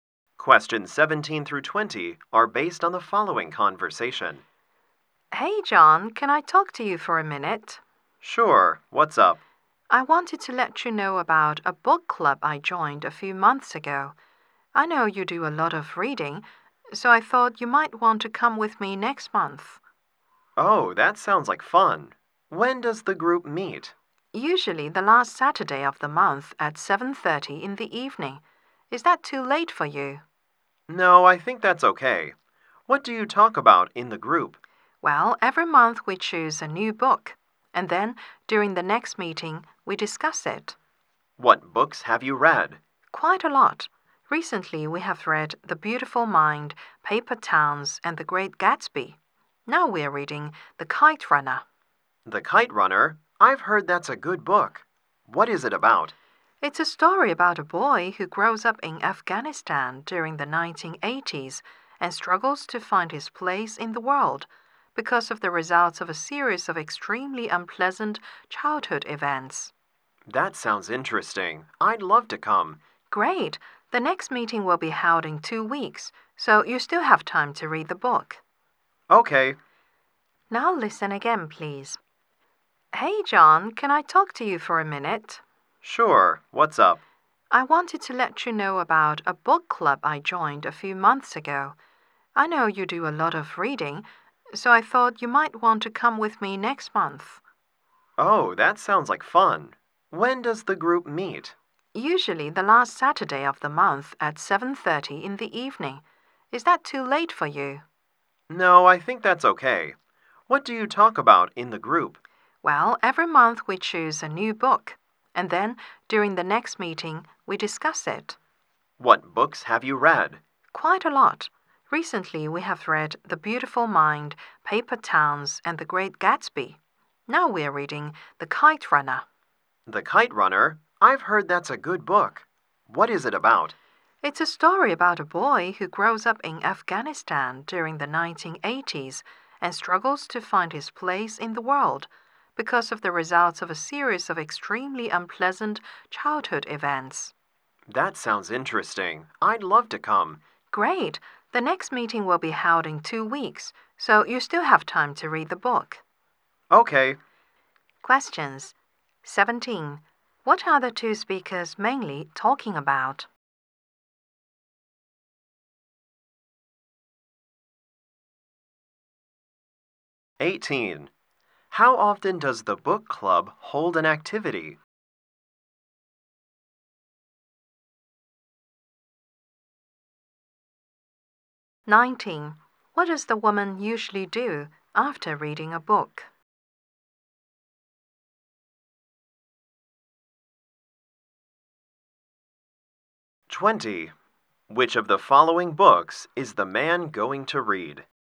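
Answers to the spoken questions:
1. A book club
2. Once a month
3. Discuss it at the next meeting
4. The Kite Runner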